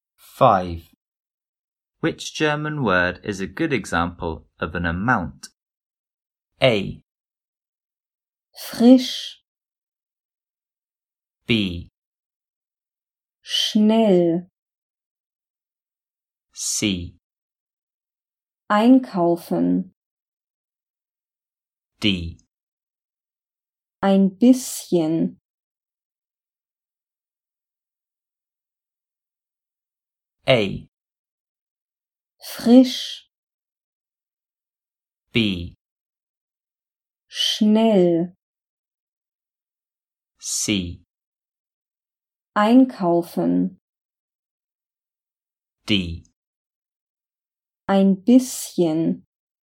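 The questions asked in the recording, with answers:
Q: Which German word is a good example of an amount?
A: D: Ein bisschen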